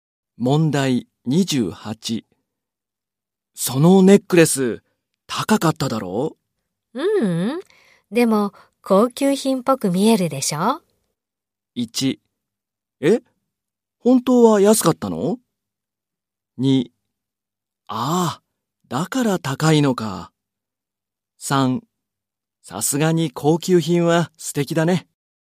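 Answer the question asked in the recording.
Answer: 1: え?本当は安かったの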